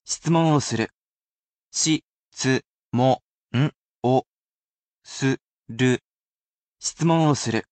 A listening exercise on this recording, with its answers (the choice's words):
Please choose the romanisation of the following word:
しつもんを する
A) shitsumon wo suru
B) jisho wo hiku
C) hakaru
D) kiku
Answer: shitsumon wo suru